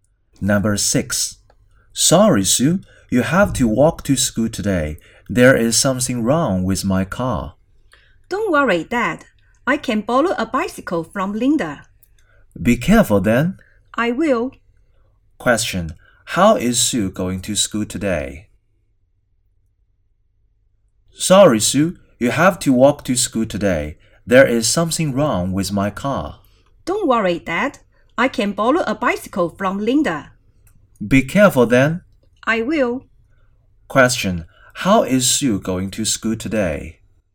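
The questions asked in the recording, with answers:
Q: Question, how is Sue going to school today?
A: By bicycle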